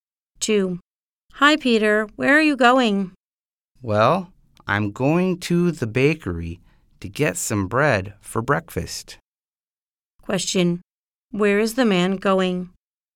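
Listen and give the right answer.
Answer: To the bakery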